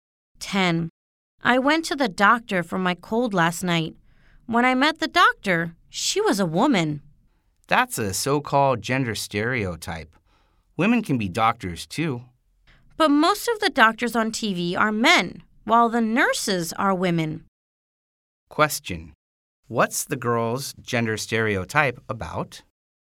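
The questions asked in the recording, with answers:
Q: what's the girl's gender stereotype about?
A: That doctors are men (and nurses are women)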